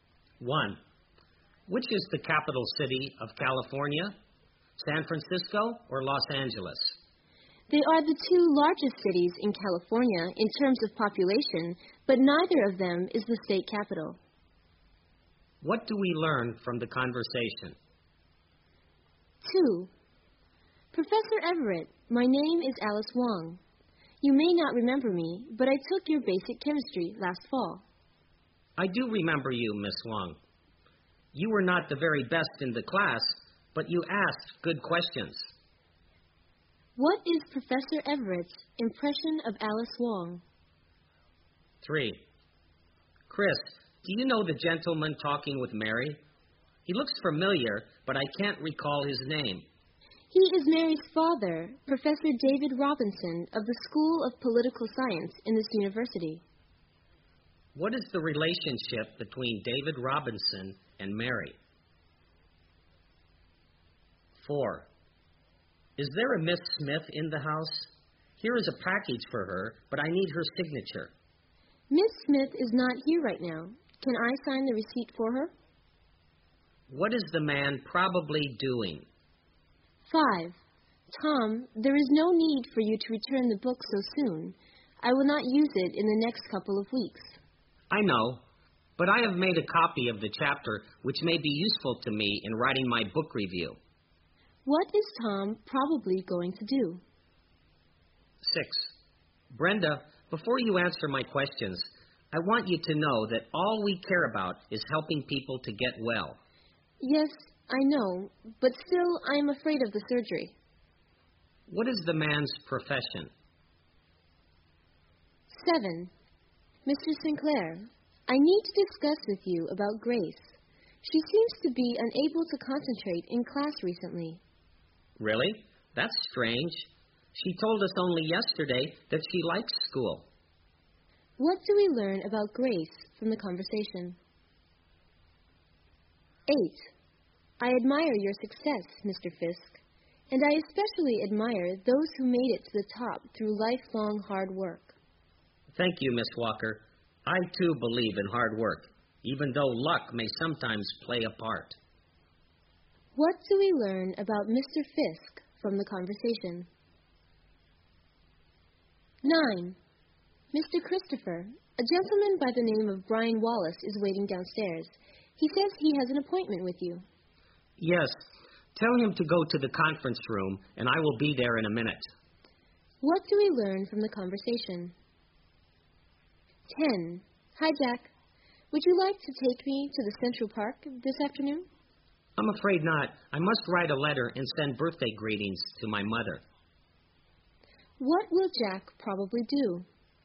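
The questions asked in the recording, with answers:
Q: What do we learn from the conversation?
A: Neither San Francisco nor Los Angeles is California's capital

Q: What is Professor Everett's impression of Alice Wong?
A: She was not the best student but asked good questions

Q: What is the relationship between David Robinson and Mary?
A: He is Mary's father

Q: What is the man probably doing?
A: Delivering a package

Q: What is Tom probably going to do?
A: Return the book

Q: What is the man's profession?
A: A doctor (surgeon)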